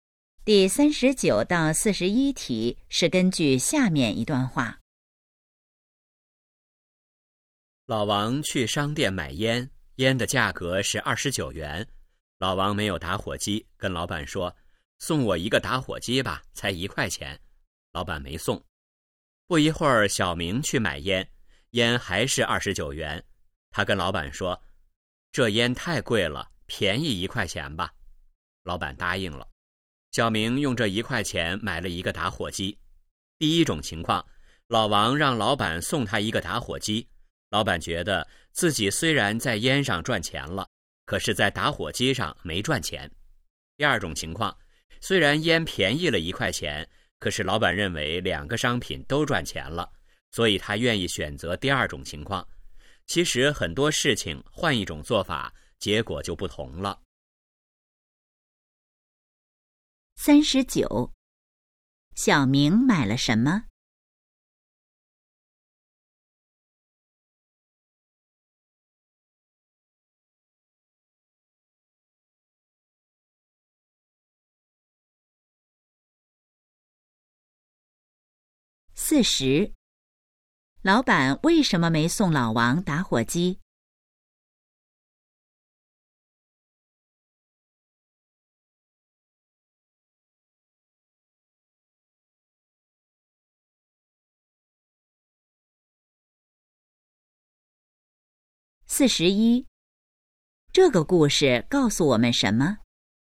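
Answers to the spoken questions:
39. 烟和打火机
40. 觉得在打火机上没赚钱
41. 换一种做法,结果就不同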